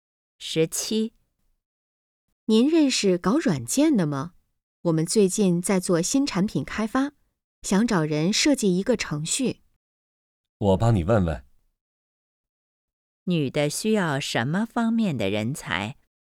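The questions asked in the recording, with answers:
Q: 女的需要什么方面的人才?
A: 软件程序设计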